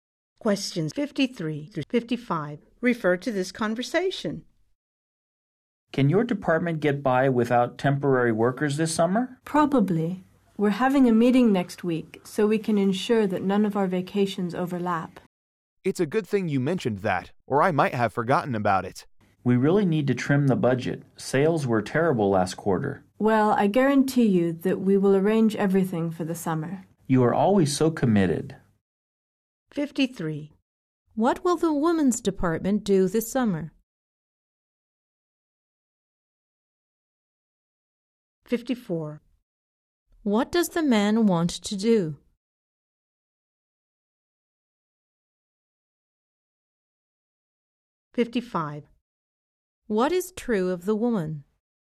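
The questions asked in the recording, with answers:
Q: What will the women's department do this summer?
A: Manage without temporary workers

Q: What does the man want to do?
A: Trim the budget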